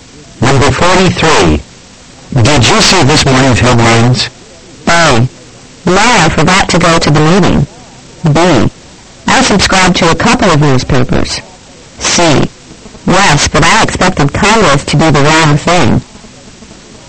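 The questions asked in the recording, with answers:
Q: Did you see this morning's headlines?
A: C: Yes, but I expected Congress to do the wrong thing.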